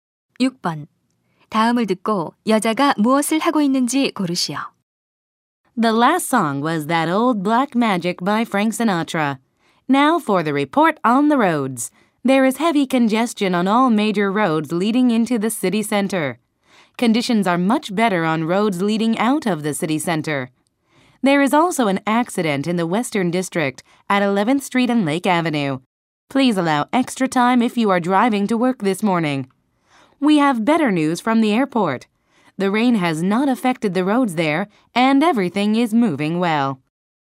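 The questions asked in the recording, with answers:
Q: 다음을 듣고 여자가 무엇을 하고 있는지 고르시오.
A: 라디오 교통 정보 방송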